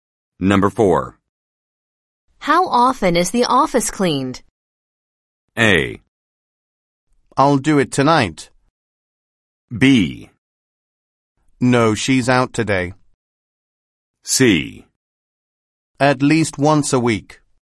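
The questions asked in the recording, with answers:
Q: How often is the office cleaned?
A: C: At least once a week.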